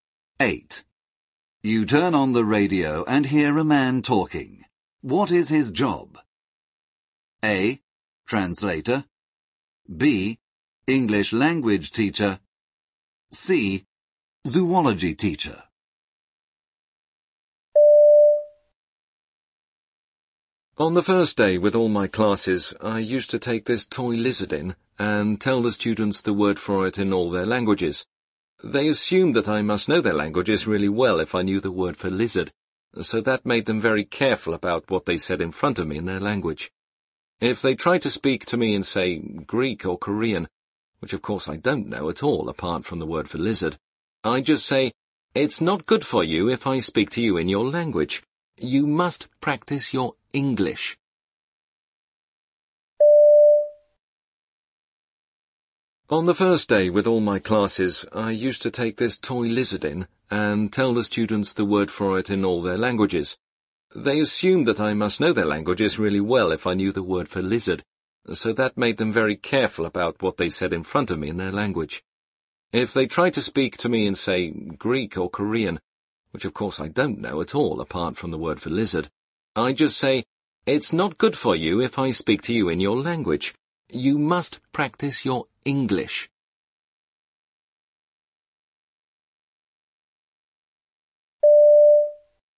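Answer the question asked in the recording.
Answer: B: English language teacher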